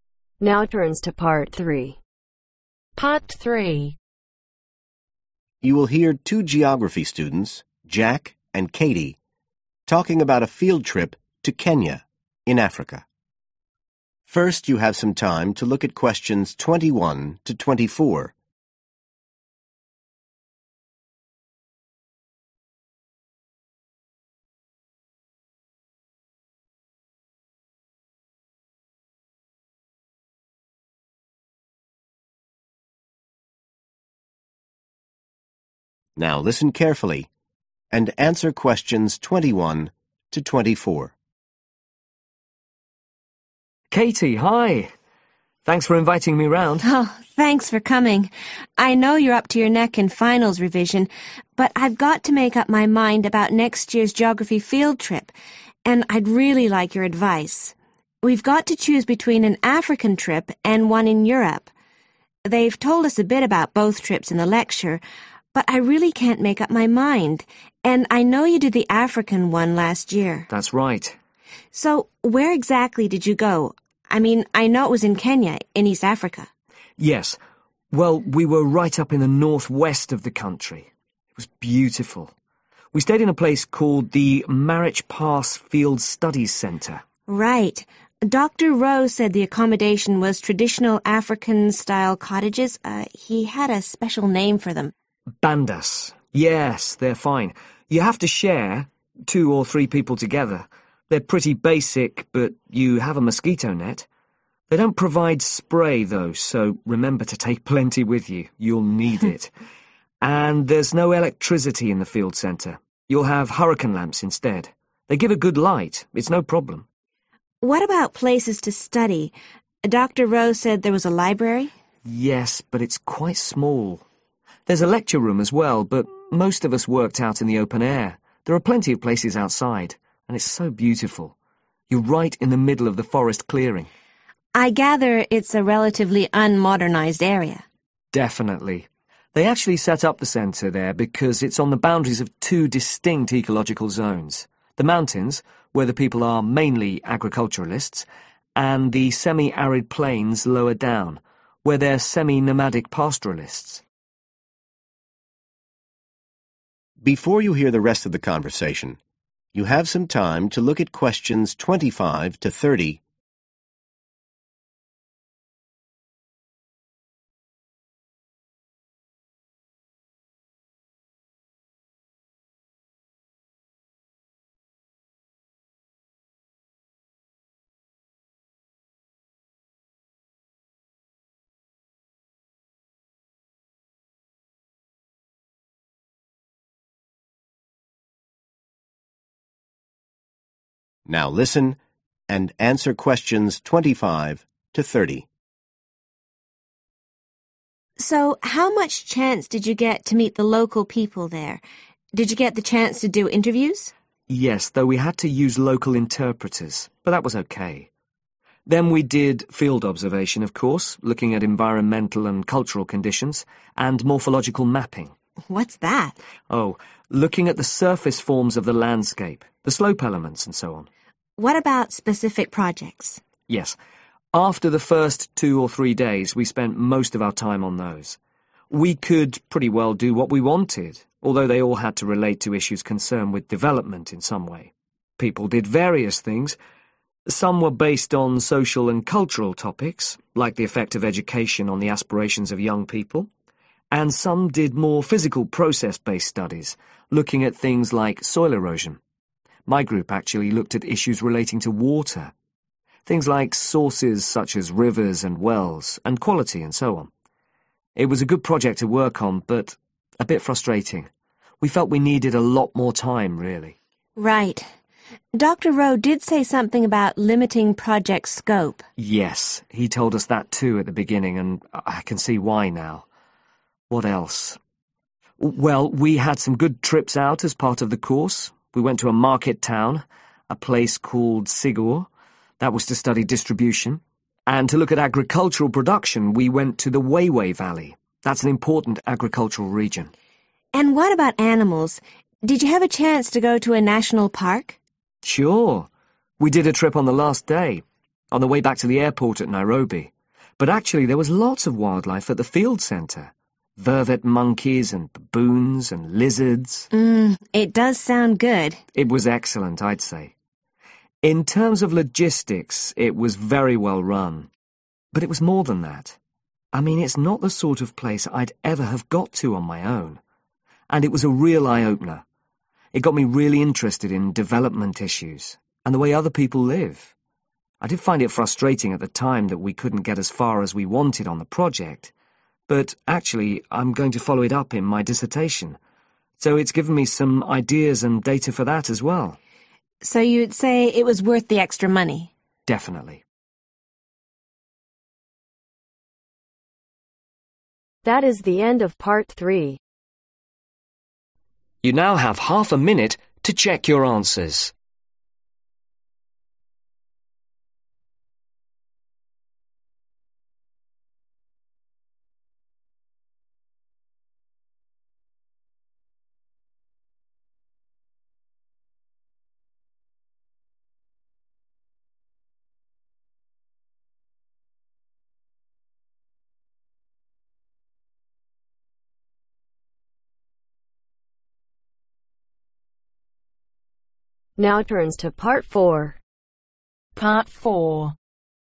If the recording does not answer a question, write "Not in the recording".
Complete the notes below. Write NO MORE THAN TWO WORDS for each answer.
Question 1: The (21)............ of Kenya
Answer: north(-)west

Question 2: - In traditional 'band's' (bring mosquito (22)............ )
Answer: spray

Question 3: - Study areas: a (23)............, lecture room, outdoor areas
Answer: (small) library

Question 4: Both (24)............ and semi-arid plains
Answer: mountains

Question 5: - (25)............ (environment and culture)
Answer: field observation

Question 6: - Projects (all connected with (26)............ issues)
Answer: development

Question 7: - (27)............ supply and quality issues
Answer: water

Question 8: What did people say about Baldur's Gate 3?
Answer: Not in the recording

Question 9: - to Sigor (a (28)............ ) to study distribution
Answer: market town

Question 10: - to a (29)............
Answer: national park

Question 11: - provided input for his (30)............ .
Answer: dissertation